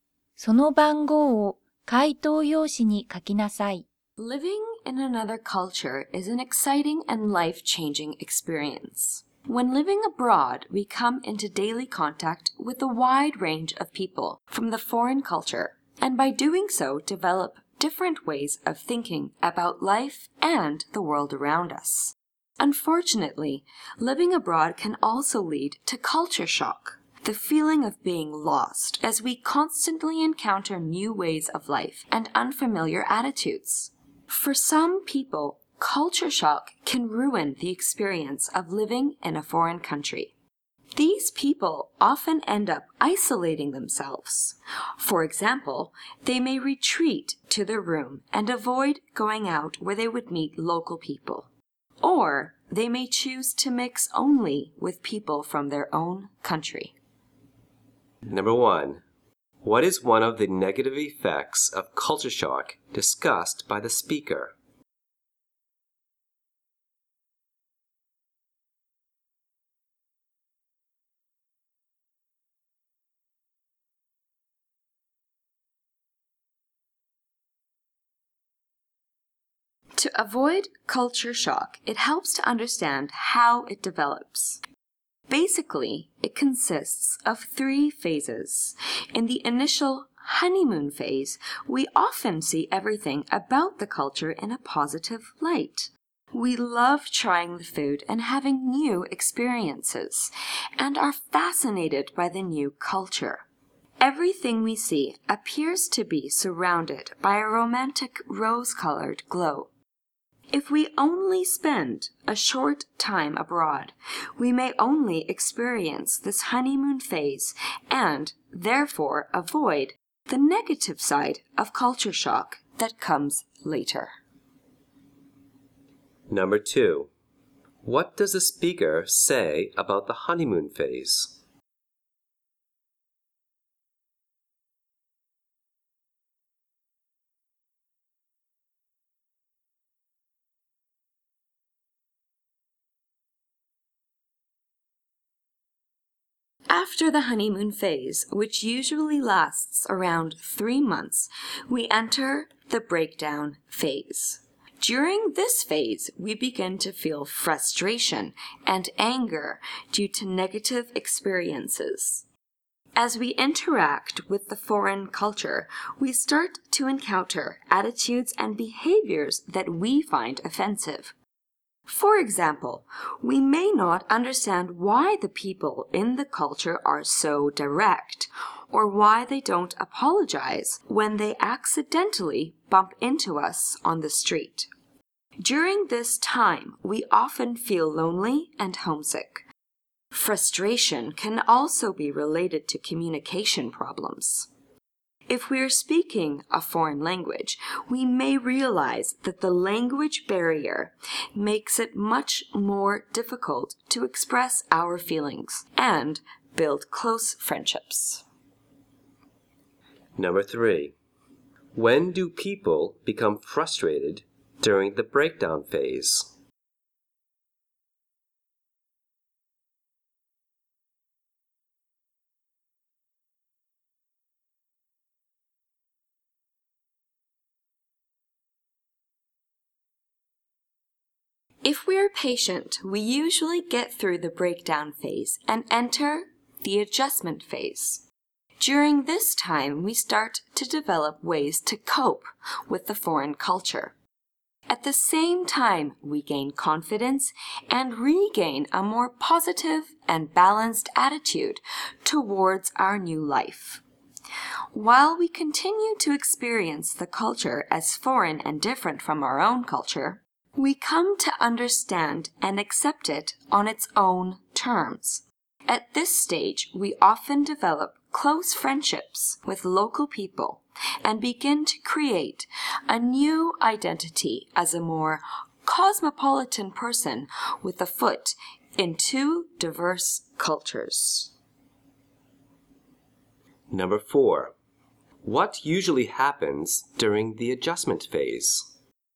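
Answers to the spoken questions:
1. People may isolate themselves and avoid meeting local people.
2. People see the culture positively, and if they stay only a short time, they may avoid the negative side.
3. When they meet attitudes they find offensive or have communication problems
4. People learn to cope, regain confidence and make close friends with local people.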